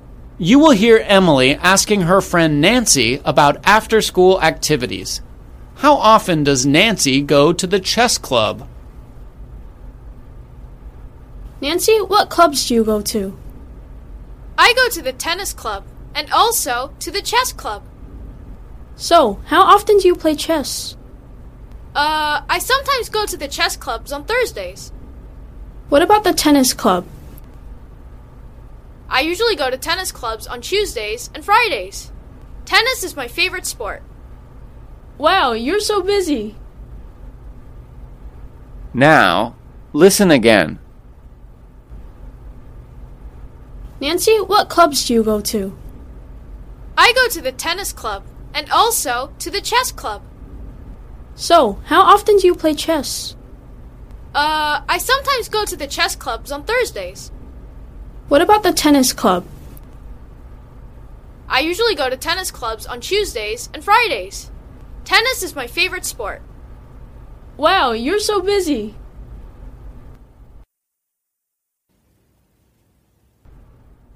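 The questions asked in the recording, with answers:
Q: How often does Nancy go to the chess club?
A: Sometimes, on Thursdays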